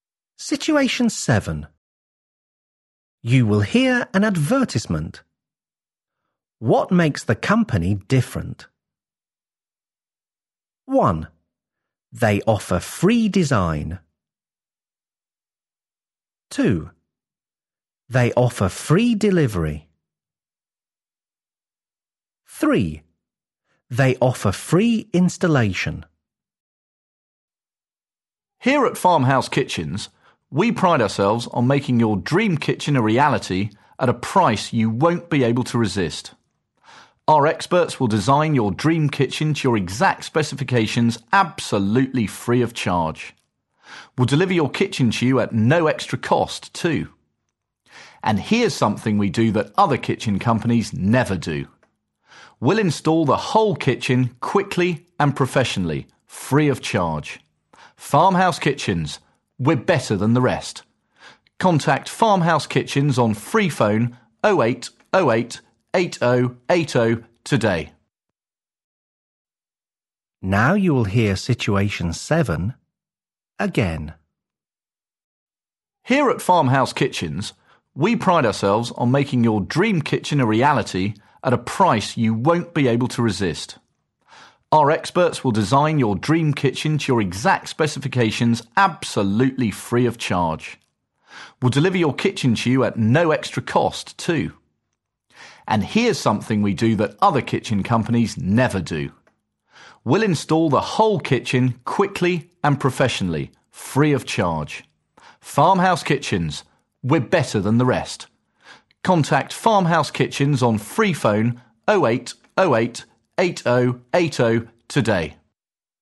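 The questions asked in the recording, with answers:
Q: What makes the company different?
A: 3: They offer free installation.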